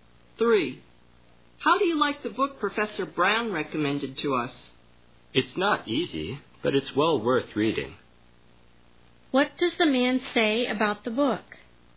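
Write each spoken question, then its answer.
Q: What does the man say about the book?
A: It's difficult but well worth reading.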